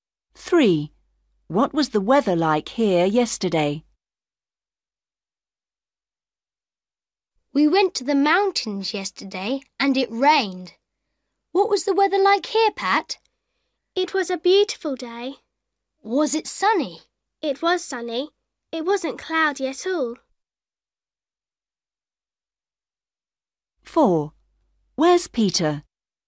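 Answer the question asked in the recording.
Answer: Sunny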